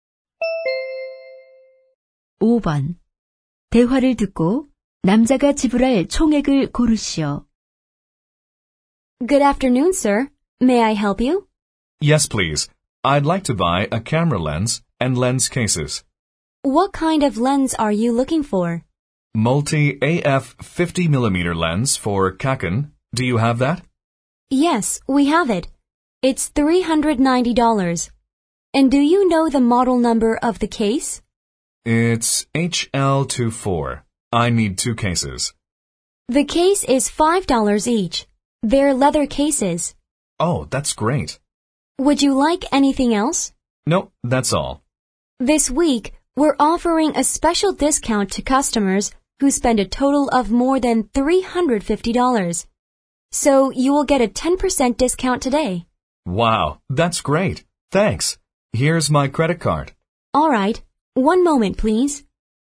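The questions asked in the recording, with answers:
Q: 대화를 듣고 남자가 지불할 총액을 고르시오.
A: $360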